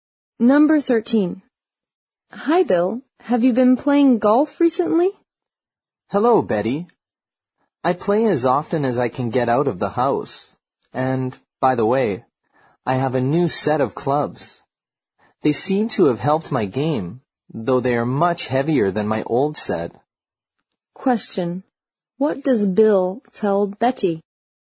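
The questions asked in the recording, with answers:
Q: What does Bill tell Betty?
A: His new, heavier golf clubs have helped his game.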